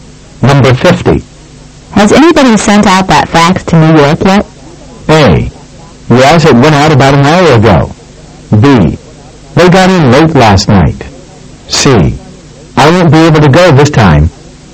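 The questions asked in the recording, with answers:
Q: Has anybody sent out that fax to New York yet?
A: A: Yes, it went out about an hour ago.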